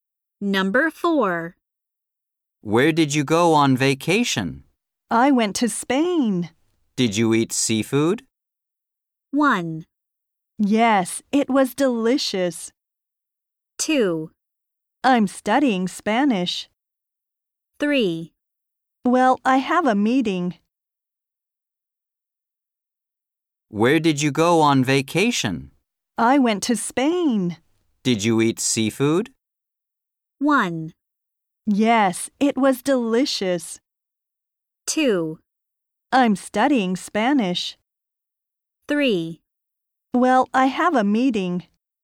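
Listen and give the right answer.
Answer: 1: Yes, it was delicious.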